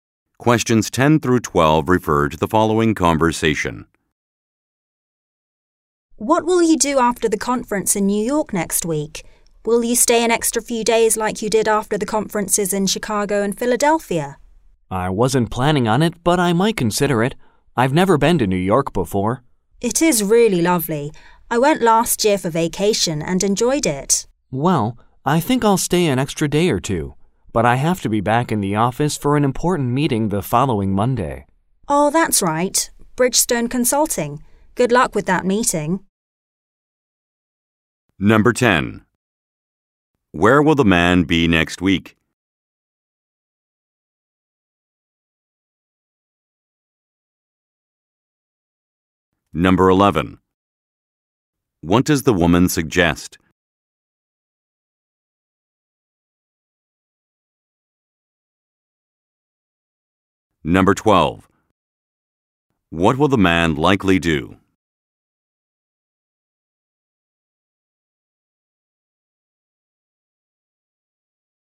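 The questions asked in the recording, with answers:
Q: Where will the man be next week?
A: In New York, at a conference

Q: What will the man likely do?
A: Stay an extra day or two in New York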